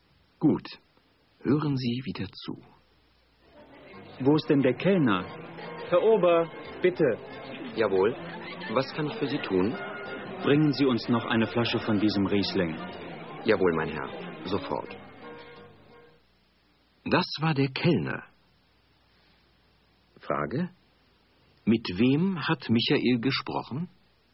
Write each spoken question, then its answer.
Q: Frage: Mit wem hat Michael gesprochen?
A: Er hat mit dem Kellner gesprochen.